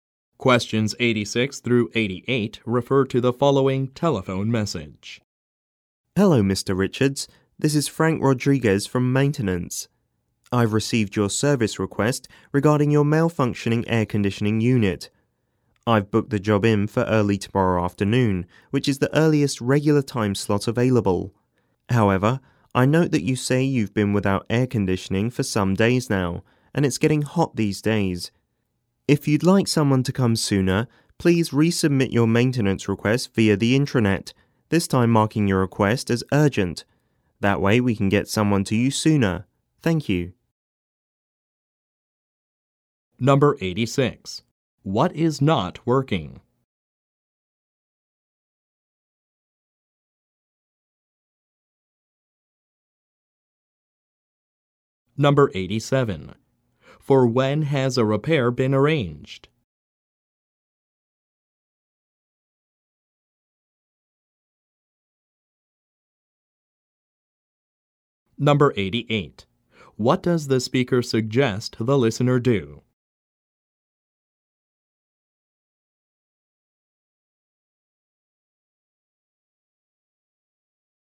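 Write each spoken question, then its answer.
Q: What is not working?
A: The air conditioning unit

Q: For when has a repair been arranged?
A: Early tomorrow afternoon

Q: What does the speaker suggest the listener do?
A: Resubmit the maintenance request via the intranet, marked as urgent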